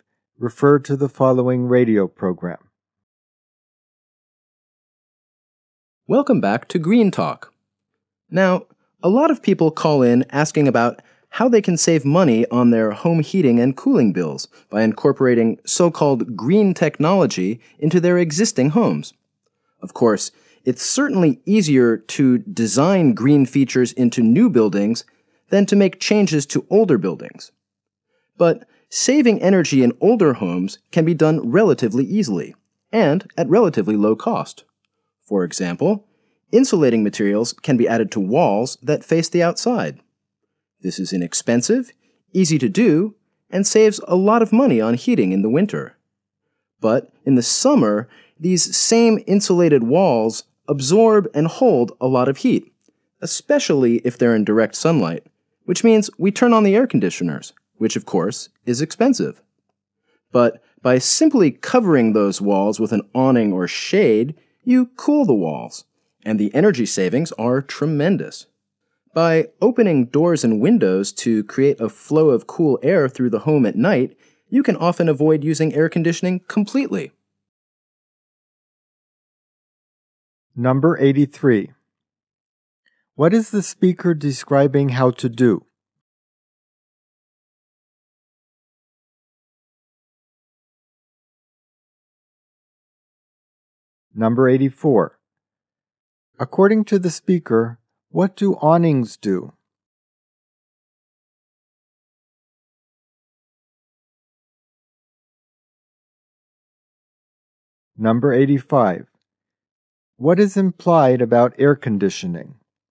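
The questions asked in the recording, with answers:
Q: What is the speaker describing how to do?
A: Save energy costs in older homes

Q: According to the speaker, what do awnings do?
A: They cool the walls by shading them

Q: What is implied about air conditioning?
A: It is expensive and can often be avoided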